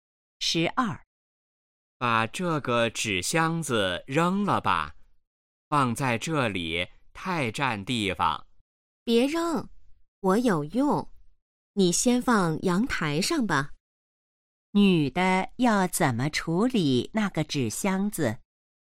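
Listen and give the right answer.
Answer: 先放阳台上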